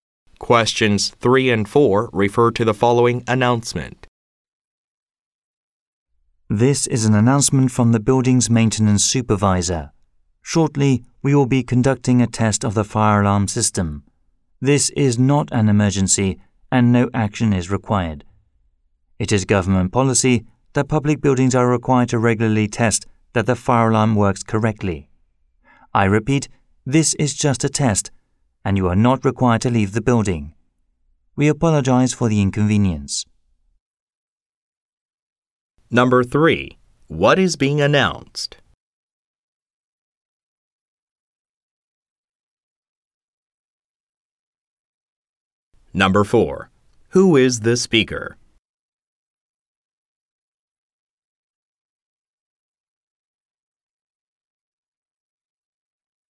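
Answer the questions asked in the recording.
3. A test of the fire alarm system
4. The building's maintenance supervisor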